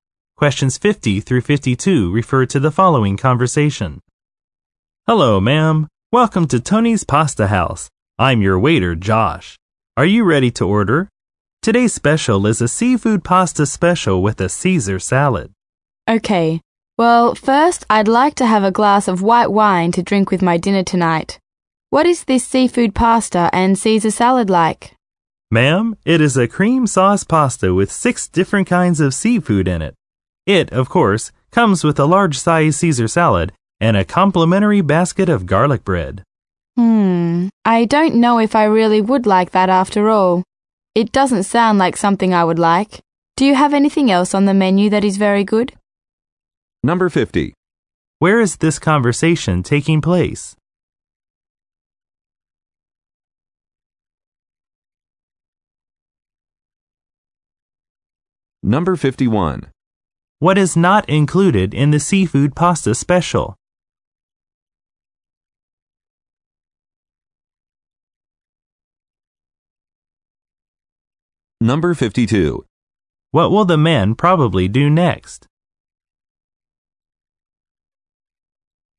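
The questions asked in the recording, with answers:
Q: Where is this conversation taking place?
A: At a restaurant (Tony's Pasta House)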